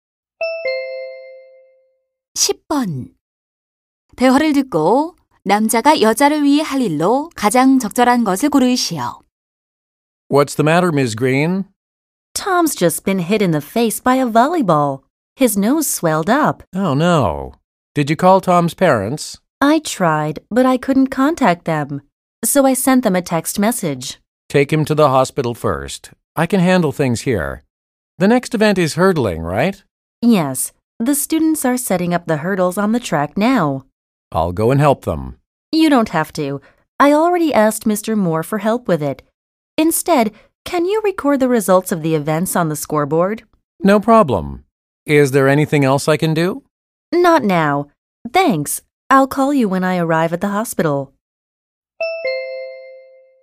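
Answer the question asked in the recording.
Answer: 경기 결과를 점수판에 기록하기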